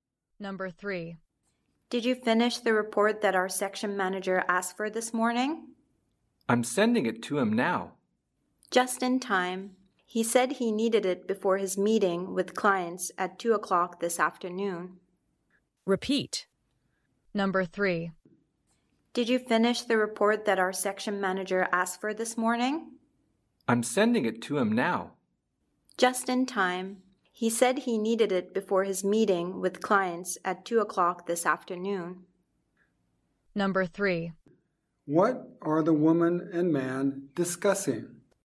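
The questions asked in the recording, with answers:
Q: What are the woman and man discussing?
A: A report the section manager needs before his 2 o'clock client meeting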